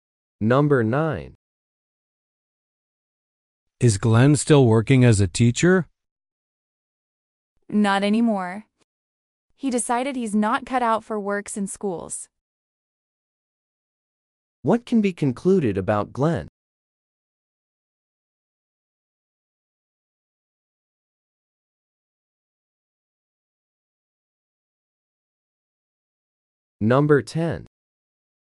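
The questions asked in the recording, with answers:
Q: What can be concluded about Glenn?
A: He quit teaching because he is not suited to working in schools.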